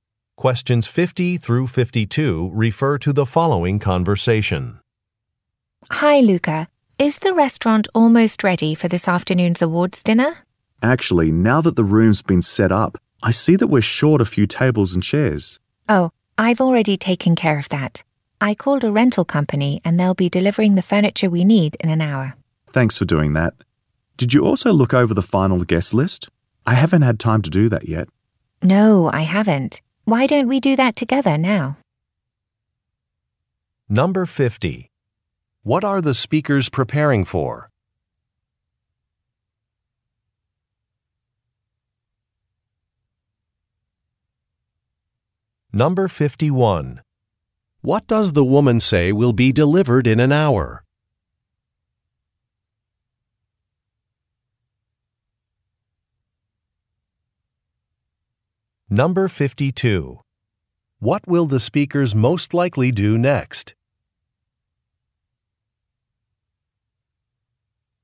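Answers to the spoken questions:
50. An awards dinner
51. Tables and chairs
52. Review the final guest list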